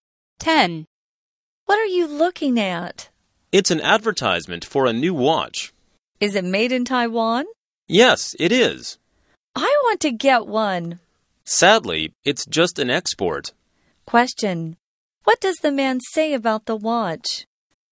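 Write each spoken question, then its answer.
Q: What does the man say about the watch?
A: It is made in Taiwan but only for export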